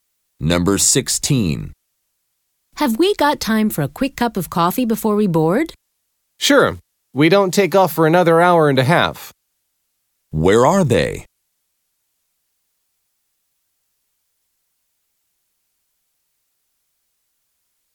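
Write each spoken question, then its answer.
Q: Where are they?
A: At the airport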